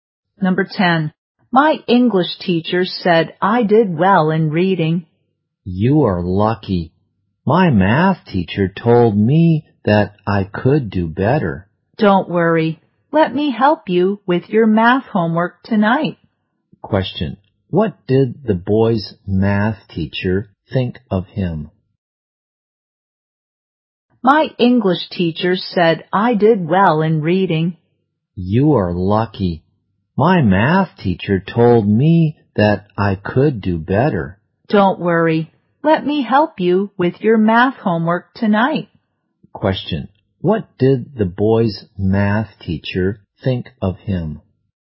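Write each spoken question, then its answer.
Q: What did the boy's math teacher think of him?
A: He could do better.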